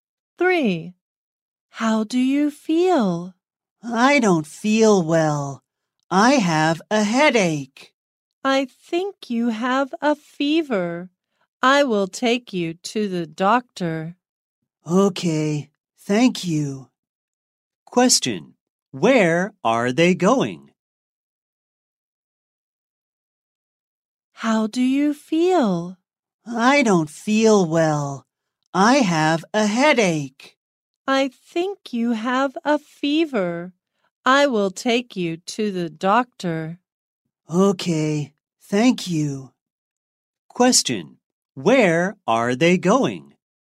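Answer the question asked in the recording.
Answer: To the doctor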